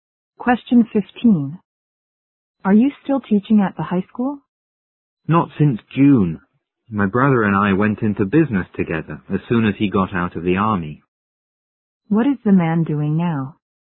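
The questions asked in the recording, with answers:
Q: What is the man doing now?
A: Running a business with his brother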